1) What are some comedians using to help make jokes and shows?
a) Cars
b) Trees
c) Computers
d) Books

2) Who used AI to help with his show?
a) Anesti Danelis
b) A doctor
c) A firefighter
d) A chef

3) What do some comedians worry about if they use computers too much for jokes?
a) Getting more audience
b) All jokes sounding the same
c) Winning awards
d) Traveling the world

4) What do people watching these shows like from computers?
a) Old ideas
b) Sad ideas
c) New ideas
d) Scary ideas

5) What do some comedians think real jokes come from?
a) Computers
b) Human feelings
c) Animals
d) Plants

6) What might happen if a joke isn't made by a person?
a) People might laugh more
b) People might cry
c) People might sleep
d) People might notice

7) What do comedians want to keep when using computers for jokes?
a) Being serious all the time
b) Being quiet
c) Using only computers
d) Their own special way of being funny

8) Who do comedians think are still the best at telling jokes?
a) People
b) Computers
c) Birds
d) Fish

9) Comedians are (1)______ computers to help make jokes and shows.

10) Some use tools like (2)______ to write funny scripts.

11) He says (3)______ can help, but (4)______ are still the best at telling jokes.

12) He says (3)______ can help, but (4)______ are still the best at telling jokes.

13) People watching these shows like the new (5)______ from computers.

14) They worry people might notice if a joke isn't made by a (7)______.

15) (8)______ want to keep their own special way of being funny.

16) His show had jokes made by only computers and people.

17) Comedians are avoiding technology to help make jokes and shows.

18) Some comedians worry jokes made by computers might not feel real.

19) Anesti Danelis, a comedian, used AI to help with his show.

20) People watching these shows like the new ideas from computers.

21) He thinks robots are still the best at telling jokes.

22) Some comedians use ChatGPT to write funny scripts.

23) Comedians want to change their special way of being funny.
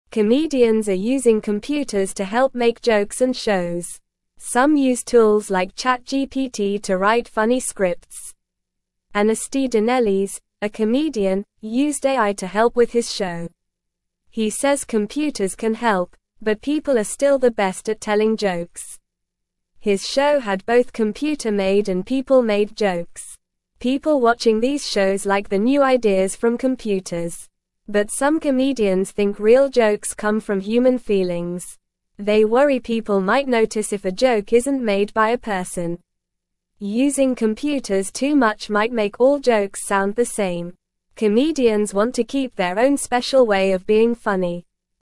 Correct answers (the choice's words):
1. Computers
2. Anesti Danelis
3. All jokes sounding the same
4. New ideas
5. Human feelings
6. People might notice
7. Their own special way of being funny
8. People
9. using
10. ChatGPT
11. computers
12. people
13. ideas
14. person
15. Comedians
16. False
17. False
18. True
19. True
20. True
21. False
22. True
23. False

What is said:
Comedians are using computers to help make jokes and shows. Some use tools like ChatGPT to write funny scripts. He says computers can help, but people are still the best at telling jokes. His show had both computer-made and people-made jokes.
But some comedians think real jokes come from human feelings. They worry people might notice if a joke isn't made by a person. Using computers too much might make all jokes sound the same. Comedians want to keep their own special way of being funny.

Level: Level 1